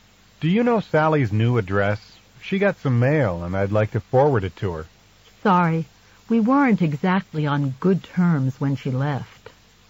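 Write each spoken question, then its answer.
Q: What does the woman imply?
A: She doesn't know Sally's new address.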